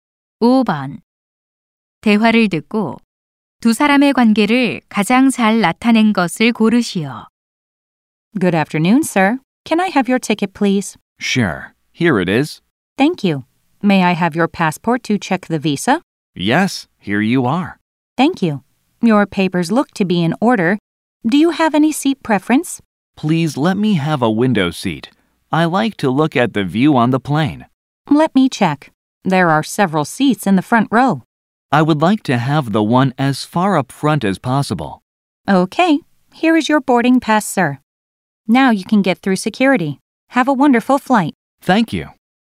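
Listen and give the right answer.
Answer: 항공사 직원 - 승객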